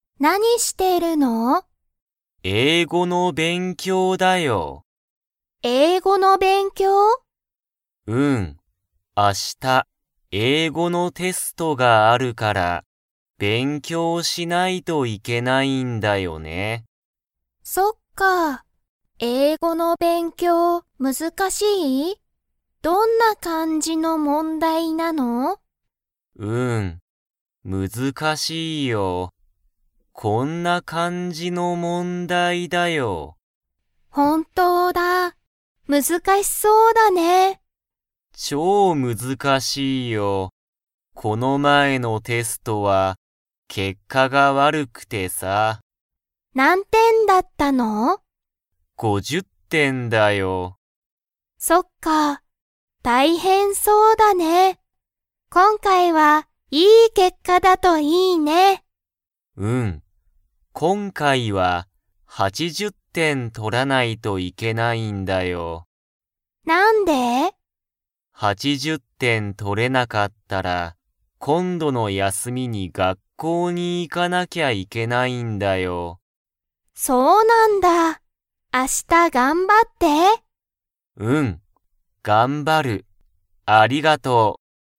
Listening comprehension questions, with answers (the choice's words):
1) ゆうたは、____英語(えいご)のテストがある。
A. 今日(きょう)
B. 明日(あした)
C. いつも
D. また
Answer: 明日(あした)

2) ゆうたのこの前(まえ)のテストは、結果(けっか)が悪わるかったですか?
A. はい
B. いいえ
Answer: はい